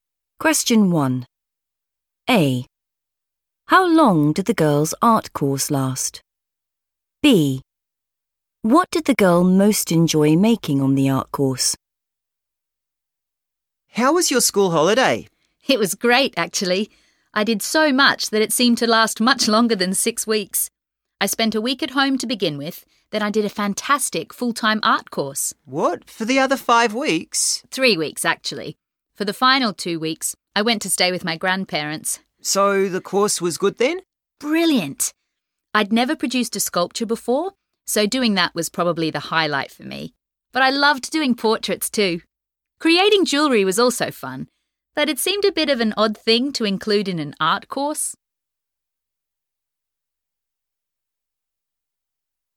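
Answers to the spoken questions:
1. 3 weeks
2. a sculpture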